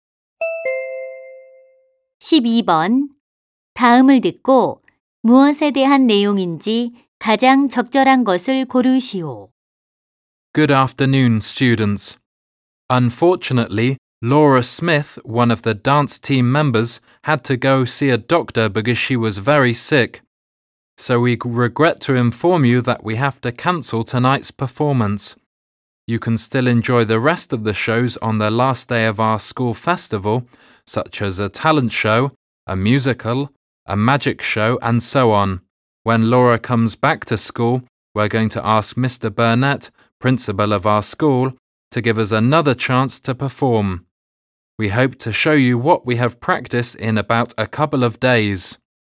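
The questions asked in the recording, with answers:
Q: 다음을 듣고 무엇에 대한 내용인지 가장 적절한 것을 고르시오.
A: 오늘 밤 댄스 공연 취소 안내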